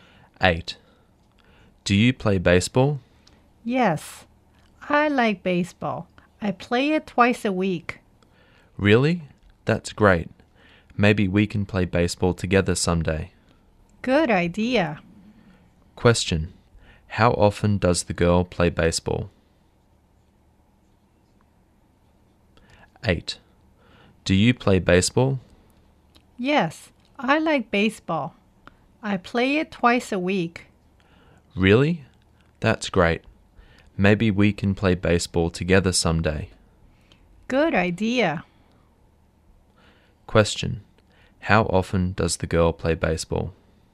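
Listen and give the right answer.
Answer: Twice a week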